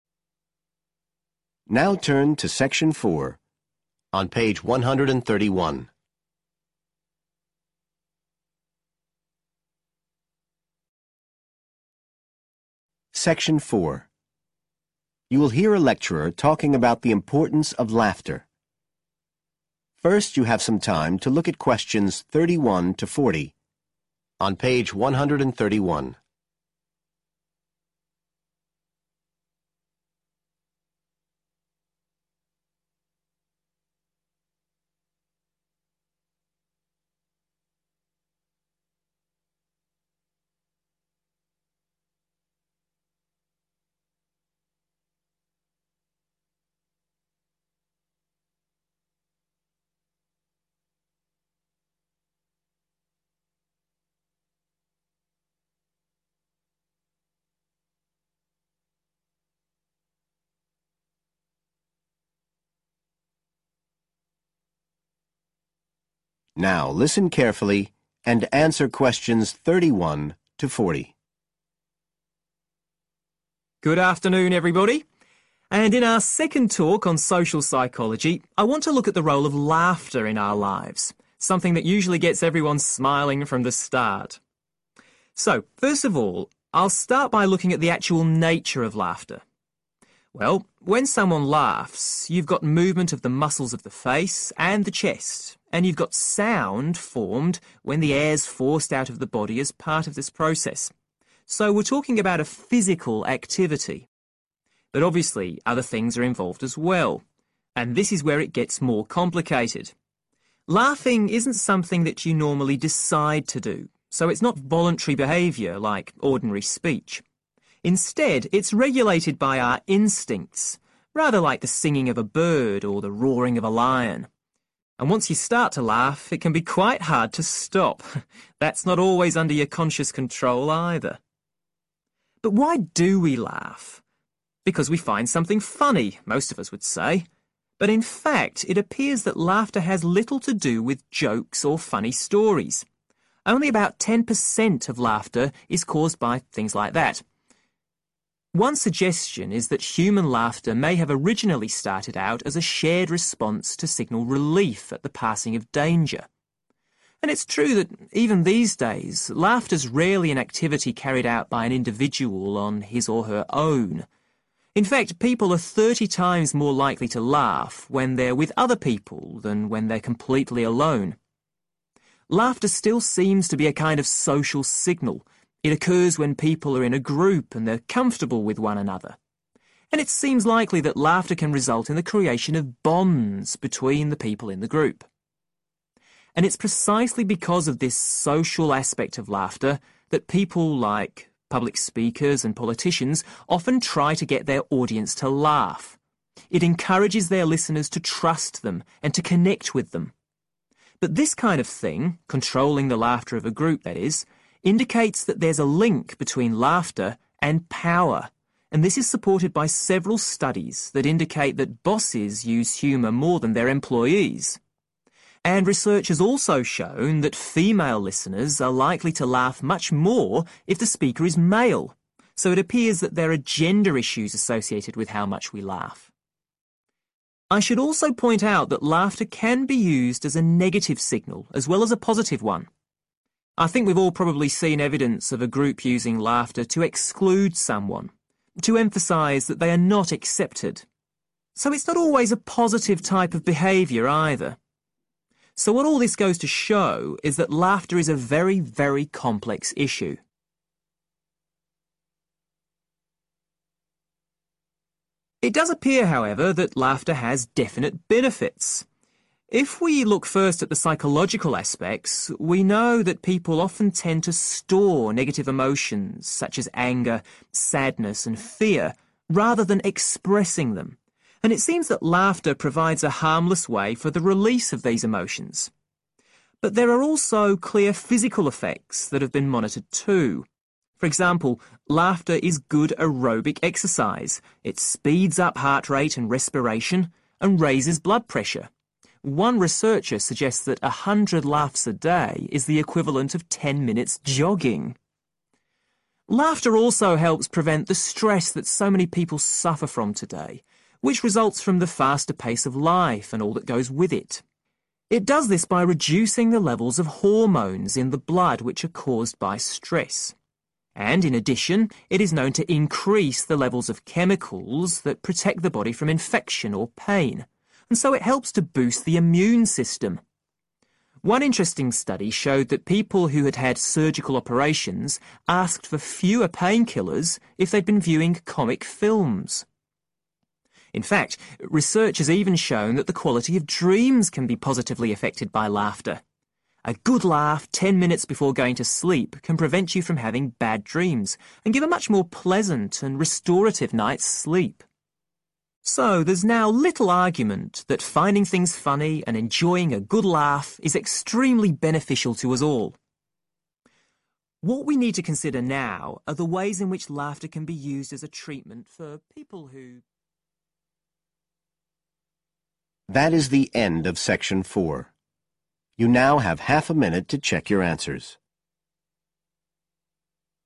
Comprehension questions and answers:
Complete the notes below. Write NO MORE THAN THREE WORDS for each answer.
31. Laughter is a (31) ............... process – involves movement and sound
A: physical

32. It is controlled by our (32) ...............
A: instincts

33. May have begun as sign of (33) ............... after a dangerous situation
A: relief

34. Nowadays may help to develop (34) ............... within a group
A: (social) bonds

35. Connected to (35) ............... (e.g. use of humor by politicians or bosses)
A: power

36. May be used in a (36) ............... way to keep someone out of a group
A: negative

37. Safe method for the (37)............... of emotions such as anger and sadness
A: release

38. Leads to drop in levels of stress-related (38)...............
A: hormones

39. Improved the (39)...............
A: immune system

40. Can stop (40)...............and improve sleep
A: bad dreams